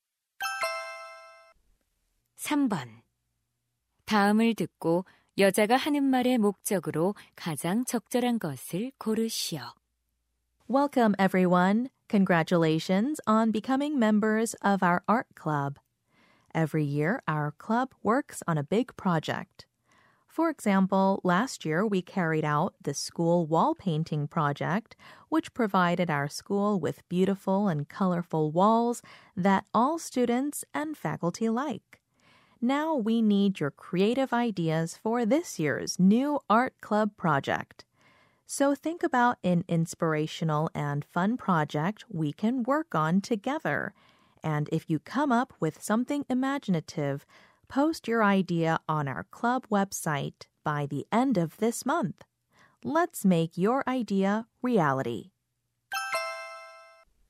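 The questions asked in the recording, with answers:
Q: 다음을 듣고 여자가 하는 말의 목적으로 가장 적절한 것을 고르시오.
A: 동아리의 올해 프로젝트 아이디어를 웹사이트에 올려 달라고 요청하려고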